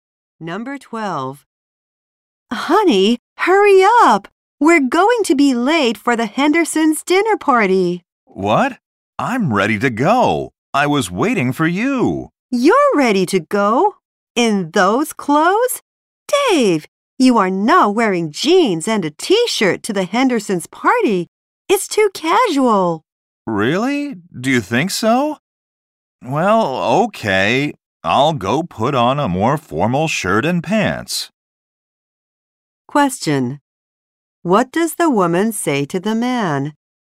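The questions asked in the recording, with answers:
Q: What does the woman say to the man?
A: His clothes are too casual for the party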